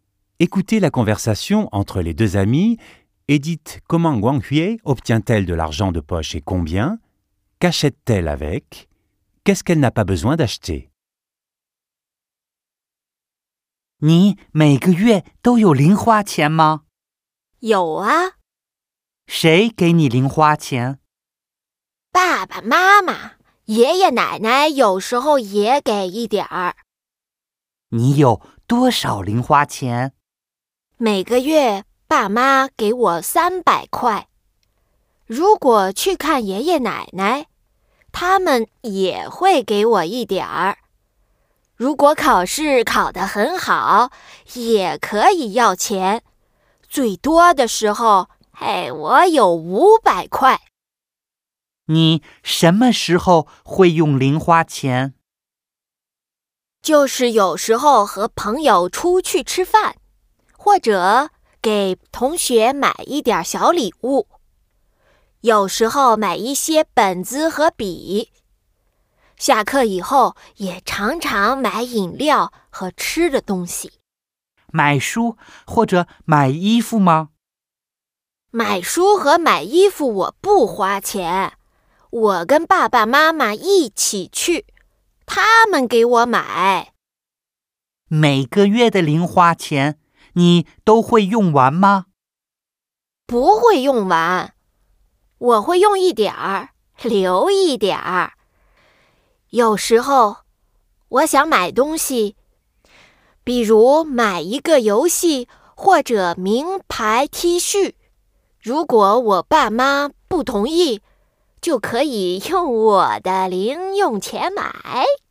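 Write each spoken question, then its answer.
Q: dites comment Guanghui obtient-elle de l'argent de poche et combien?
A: Ses parents lui donnent 300 yuans par mois ; ses grands-parents lui en donnent un peu aussi, et elle peut en demander quand elle réussit ses examens. Au maximum, elle a eu 500 yuans.

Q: Qu'achète-t-elle avec?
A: Des repas avec des amis, des petits cadeaux pour ses camarades, des cahiers et des stylos, des boissons et de quoi manger.

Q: Qu'est-ce qu'elle n'a pas besoin d'acheter?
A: Des livres et des vêtements : ses parents les lui achètent.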